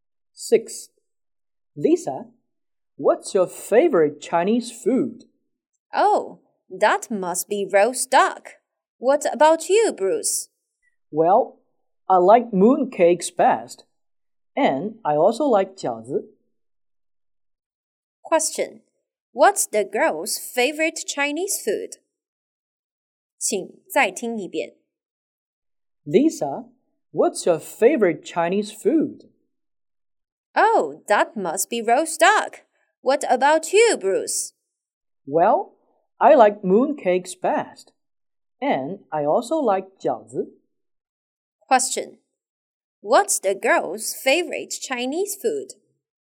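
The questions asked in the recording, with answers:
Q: What's the girl's favorite Chinese food?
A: Roast duck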